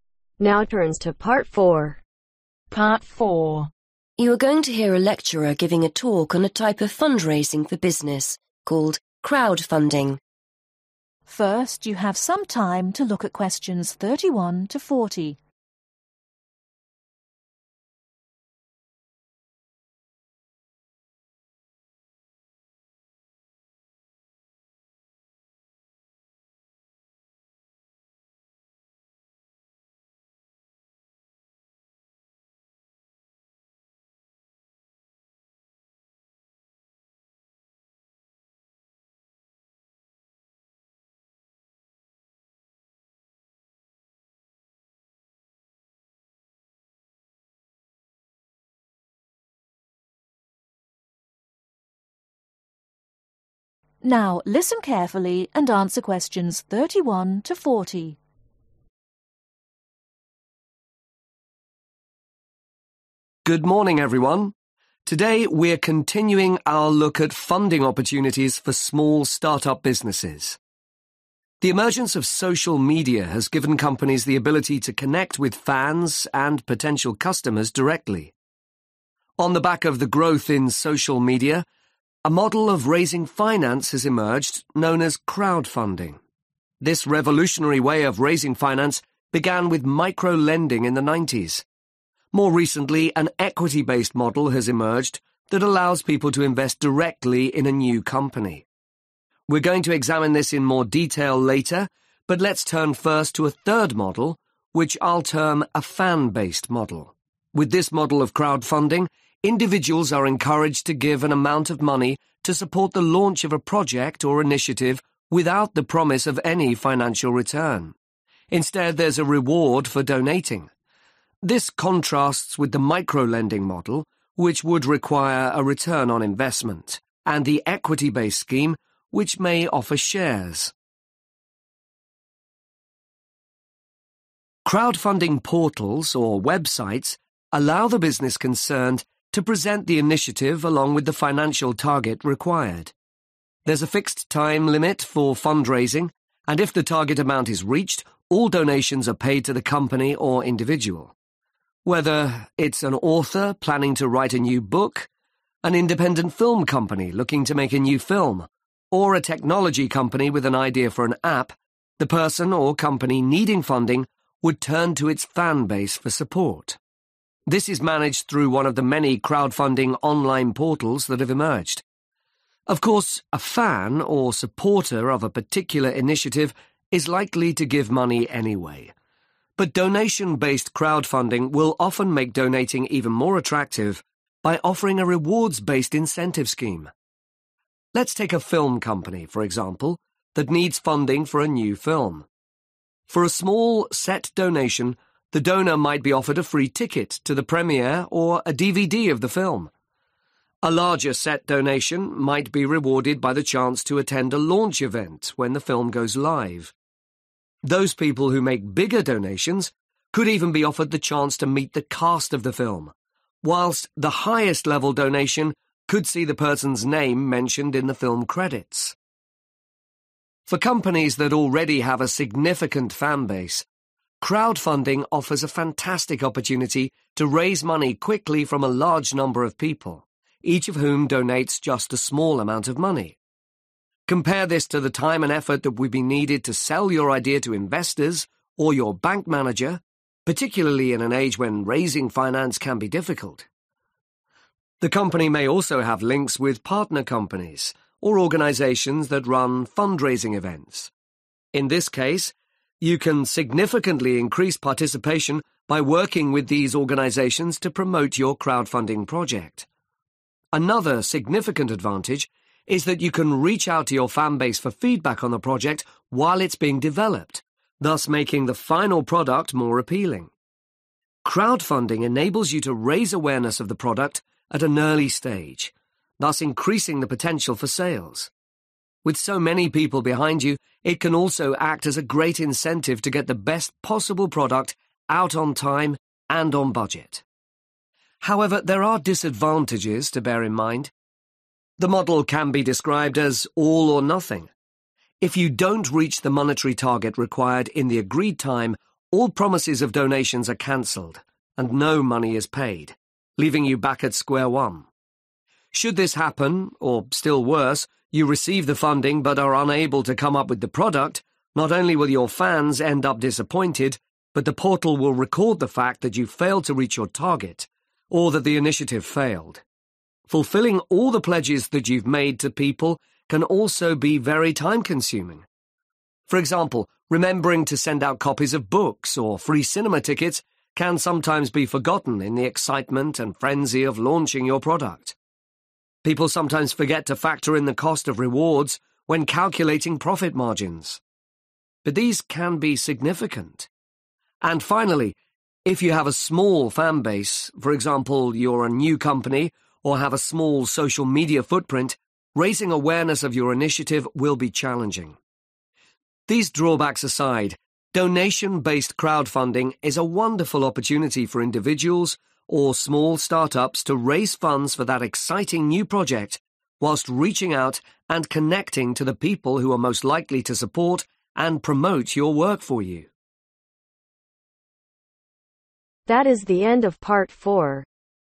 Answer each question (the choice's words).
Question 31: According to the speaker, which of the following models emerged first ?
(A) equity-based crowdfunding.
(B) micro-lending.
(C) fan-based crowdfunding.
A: micro-lending.

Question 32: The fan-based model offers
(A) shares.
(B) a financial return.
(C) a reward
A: a reward

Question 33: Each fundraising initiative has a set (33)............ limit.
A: Time

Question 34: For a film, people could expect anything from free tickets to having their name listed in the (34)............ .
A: Film credits

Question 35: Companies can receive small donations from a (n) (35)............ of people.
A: Large number

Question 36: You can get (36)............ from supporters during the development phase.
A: Feedback

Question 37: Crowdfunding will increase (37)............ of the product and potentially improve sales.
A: Awareness

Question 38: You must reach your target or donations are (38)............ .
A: Cancelled

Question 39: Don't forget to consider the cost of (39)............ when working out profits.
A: Rewards

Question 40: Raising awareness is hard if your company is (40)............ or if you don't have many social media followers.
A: New